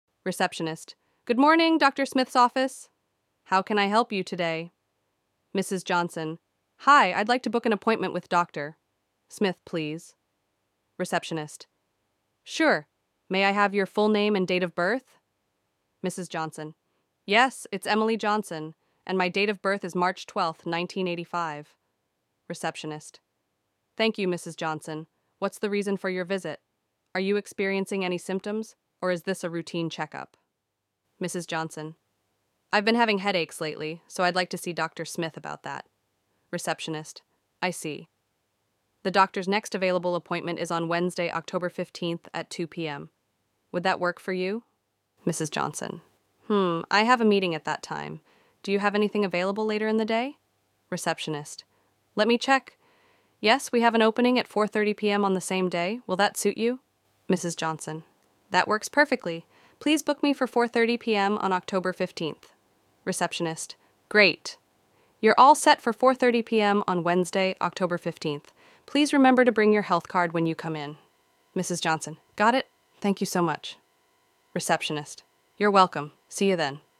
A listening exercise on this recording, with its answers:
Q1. What is Mrs. Johnson calling for?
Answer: Mrs. Johnson is calling to book an appointment with Dr. Smith.

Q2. What symptoms does Mrs. Johnson mention?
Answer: She mentions that she has been experiencing headaches.

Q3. What was the first appointment time offered by the receptionist?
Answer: The first appointment time offered was 2 p.m. on Wednesday, October 15th.

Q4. Why couldn't Mrs. Johnson take the 2 p.m. appointment?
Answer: She couldn't take the 2 p.m. appointment because she had a meeting at that time.

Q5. What time did Mrs. Johnson finally book her appointment for?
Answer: She booked her appointment for 4:30 p.m. on October 15th.

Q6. What important item does the receptionist remind Mrs. Johnson to bring?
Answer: The receptionist reminds Mrs. Johnson to bring her health card.

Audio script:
Receptionist:
"Good morning, Dr. Smith's office. How can I help you today?"
Mrs. Johnson:
"Hi, I'd like to book an appointment with Dr. Smith, please."
Receptionist:
"Sure. May I have your full name and date of birth?"
Mrs. Johnson:
"Yes, it's Emily Johnson, and my date of birth is March 12, 1985."
Receptionist:
"Thank you, Mrs. Johnson. What's the reason for your visit? Are you experiencing any symptoms, or is this a routine check-up?"
Mrs. Johnson:
"I've been having headaches lately, so I'd like to see Dr. Smith about that."
Receptionist:
"I see. The doctor's next available appointment is on Wednesday, October 15th at 2 p.m. Would that work for you?"
Mrs. Johnson:
"Hmm, I have a meeting at that time. Do you have anything available later in the day?"
Receptionist:
"Let me check... Yes, we have an opening at 4:30 p.m. on the same day. Will that suit you?"
Mrs. Johnson:
"That works perfectly. Please book me for 4:30 p.m. on October 15th."
Receptionist:
"Great! You're all set for 4:30 p.m. Please remember to bring your health card when you come in."
Mrs. Johnson:
"Got it! Thank you so much."
Receptionist:
"You're welcome! See you then."